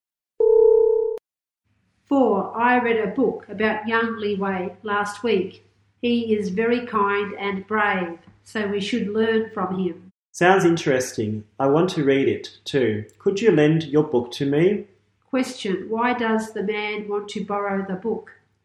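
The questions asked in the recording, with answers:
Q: Question. Why does the man want to borrow the book?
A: It sounds interesting.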